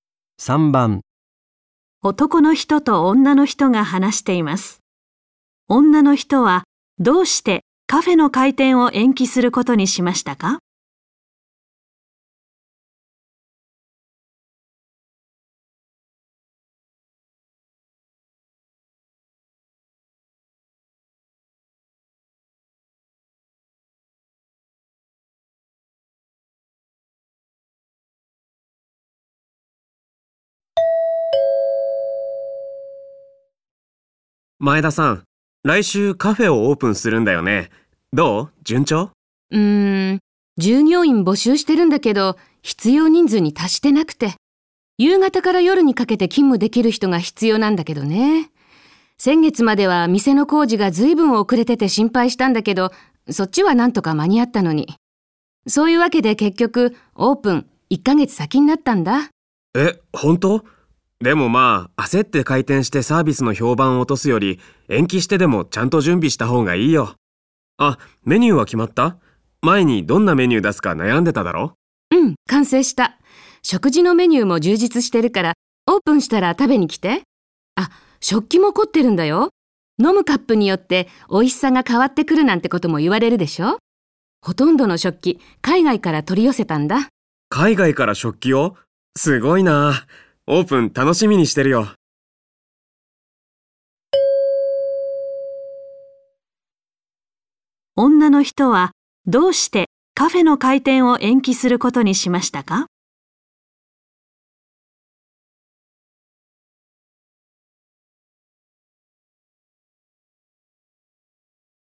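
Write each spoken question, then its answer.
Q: 女の人はどうしてカフェの開店を延期することにしましたか?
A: 従業員が必要な人数に達していないから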